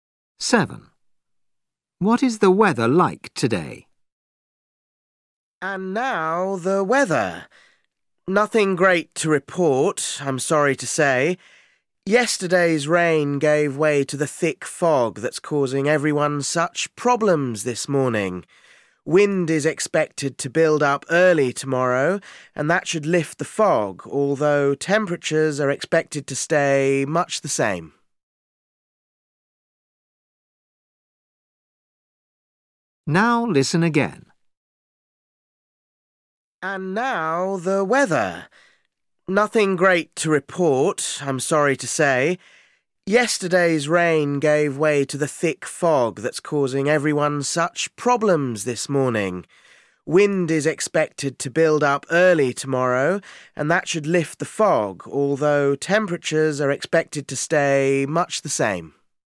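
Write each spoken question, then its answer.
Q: What is the weather like today?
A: foggy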